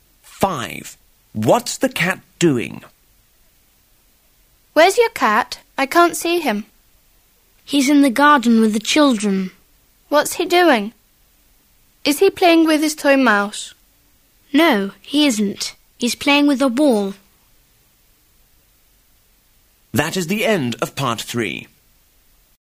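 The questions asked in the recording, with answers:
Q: What's the cat doing?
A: Playing with a ball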